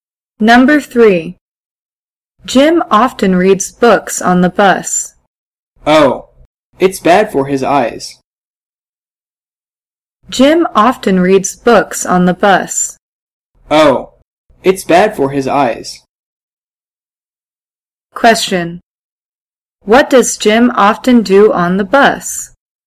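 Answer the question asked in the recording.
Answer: He reads books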